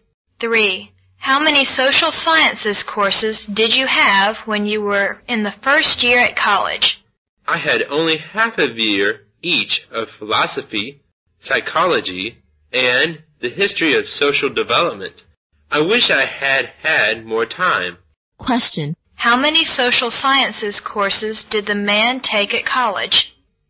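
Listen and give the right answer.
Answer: Three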